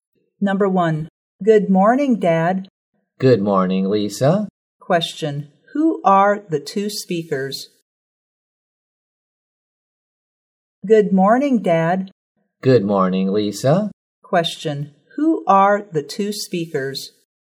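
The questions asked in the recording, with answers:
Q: Question, who are the two speakers?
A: Lisa and her dad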